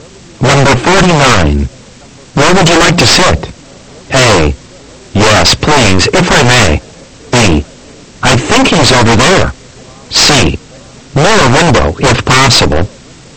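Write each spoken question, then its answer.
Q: Where would you like to sit?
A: C: Near a window, if possible.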